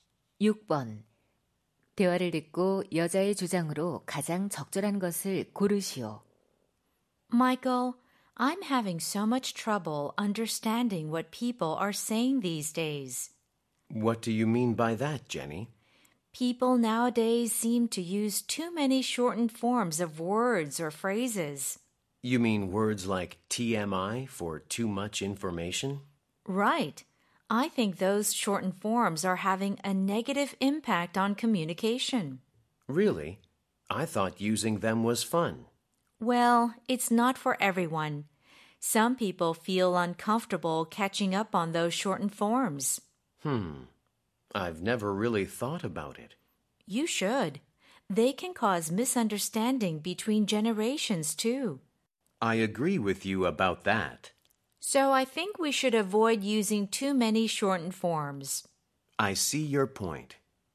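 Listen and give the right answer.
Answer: 줄임말을 지나치게 사용하지 말아야 한다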